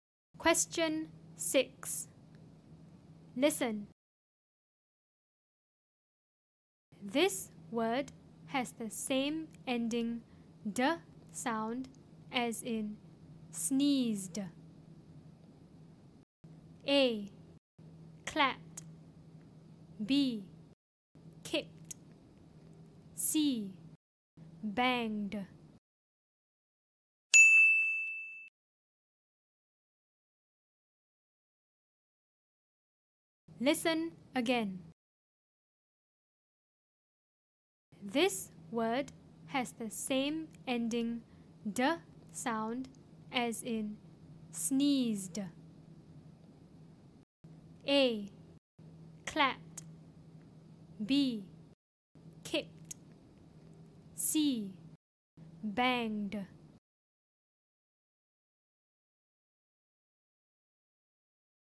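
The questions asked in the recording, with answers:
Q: This word has the same ending d sound as in sneezed.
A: C: Banged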